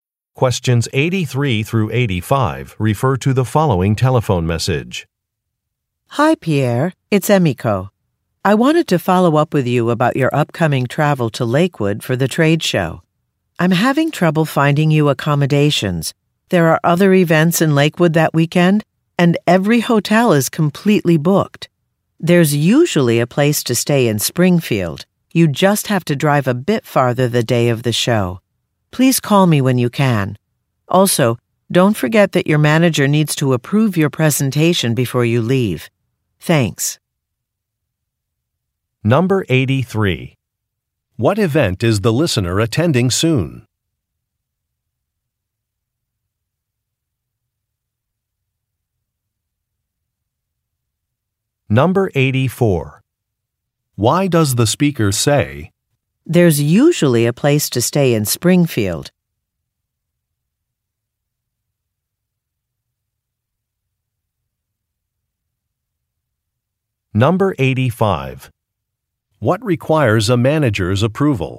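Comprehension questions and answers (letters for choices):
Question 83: What event is the listener attending soon?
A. A community fund-raiser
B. A trade show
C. A film festival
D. A sports competition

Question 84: Why does the speaker say, "There's usually a place to stay in Springfield"?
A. To confirm a reservation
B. To reject a suggestion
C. To give directions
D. To offer a solution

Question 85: What requires a managers approval?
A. A conference presentation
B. A catering request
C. An equipment purchase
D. A rental car agreement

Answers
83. B
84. D
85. A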